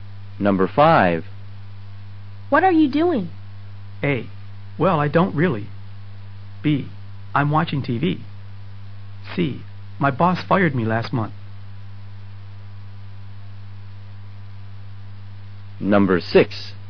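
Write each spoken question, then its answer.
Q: What are you doing?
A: B: I'm watching TV.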